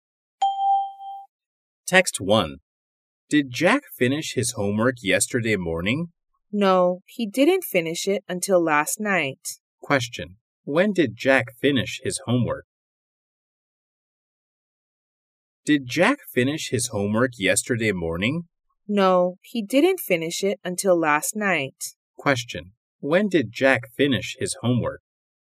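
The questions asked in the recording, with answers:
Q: When did Jack finish his homework?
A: Last night.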